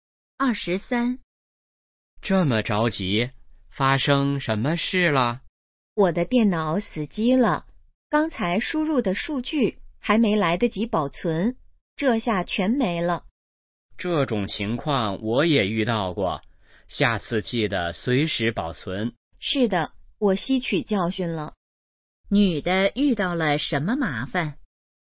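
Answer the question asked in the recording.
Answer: 电脑死机,数据没保存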